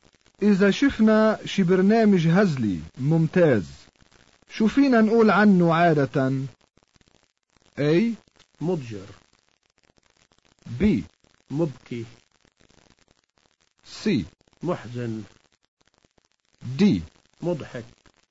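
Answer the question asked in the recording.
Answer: D: مضحك.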